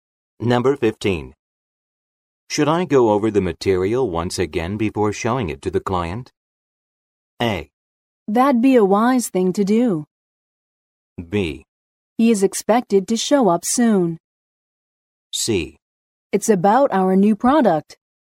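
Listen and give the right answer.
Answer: A: That'd be a wise thing to do.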